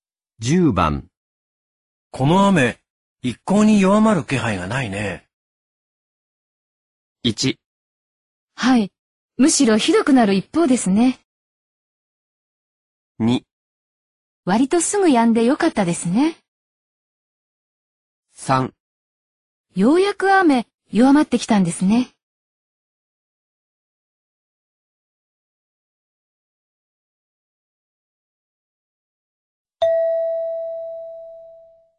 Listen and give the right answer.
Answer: 1

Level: N2